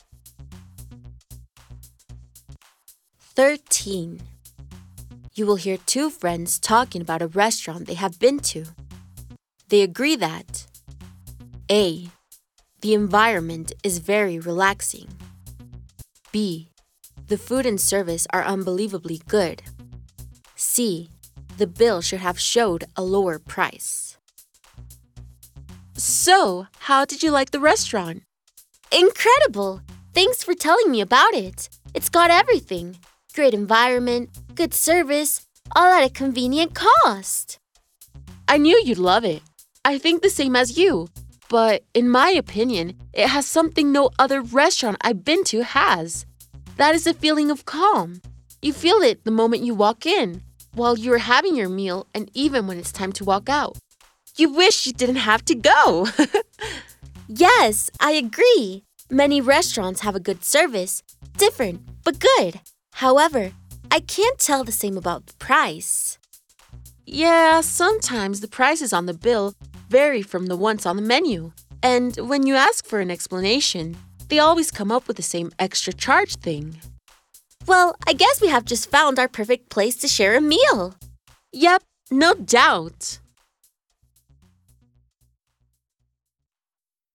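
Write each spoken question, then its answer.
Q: They agree that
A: A: the environment is very relaxing.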